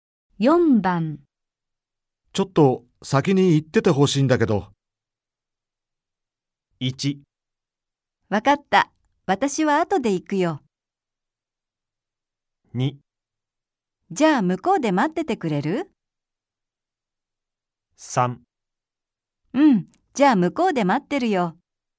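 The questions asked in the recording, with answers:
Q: ちょっと先に行っててほしいんだけど。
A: 3: うん、じゃあ向こうで待ってるよ。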